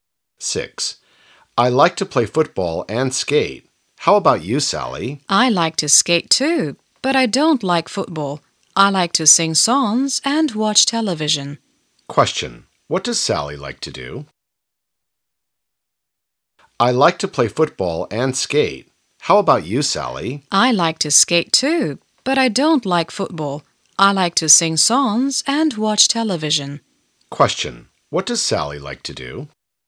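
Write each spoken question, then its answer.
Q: What does Sally like to do?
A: Skate, sing songs and watch television.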